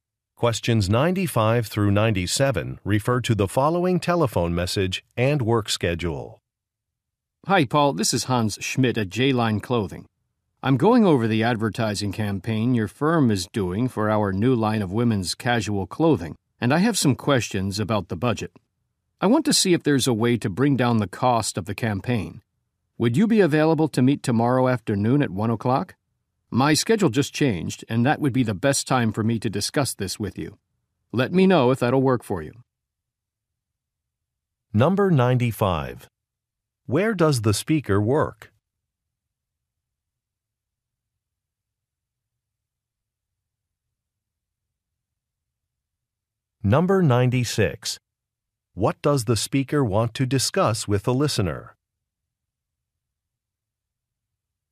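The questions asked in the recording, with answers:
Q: Where does the speaker work?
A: At a clothing company

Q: What does the speaker want to discuss with the listener?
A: Reducing the cost of the advertising campaign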